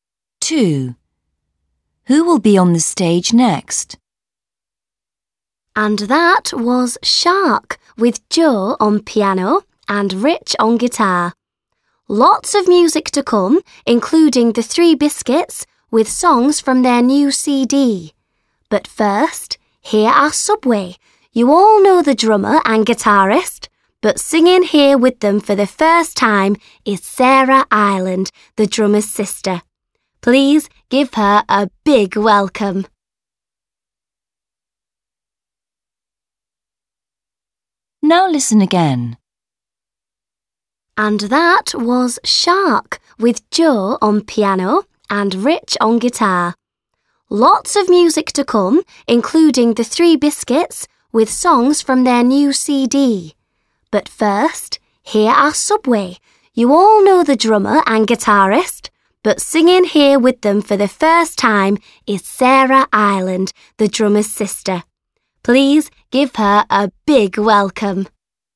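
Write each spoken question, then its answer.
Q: Who will be on the stage next?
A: Subway: drummer, guitarist and singer Sarah Ireland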